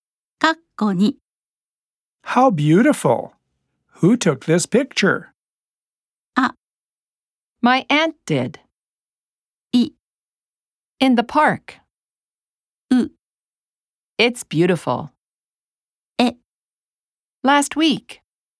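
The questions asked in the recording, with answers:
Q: Who took this picture?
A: あ: My aunt did.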